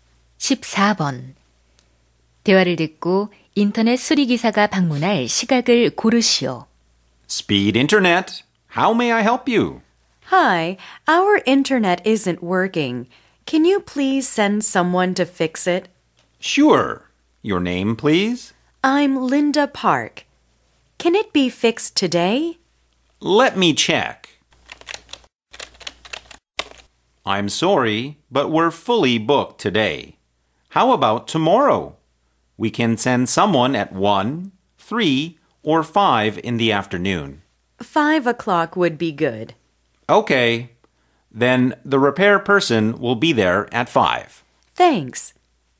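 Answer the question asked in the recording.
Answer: (내일 오후) 5시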